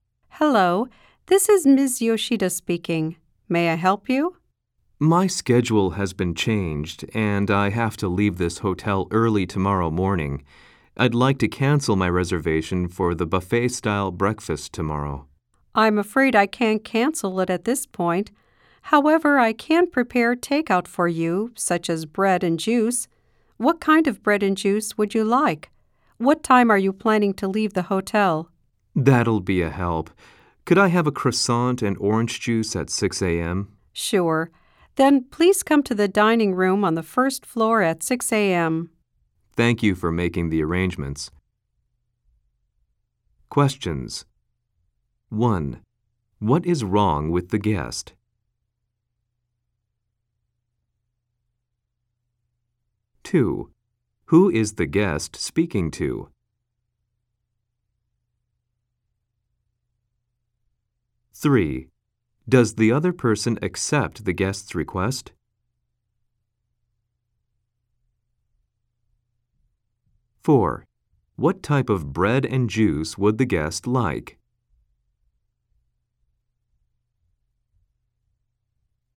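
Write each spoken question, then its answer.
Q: What is wrong with the guest?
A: The guest's schedule changed, so they have to leave the hotel early tomorrow morning.

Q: Does the other person accept the guest's request?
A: No, she can't cancel the breakfast, but she offers takeout instead.

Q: What type of bread and juice would the guest like?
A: A croissant and orange juice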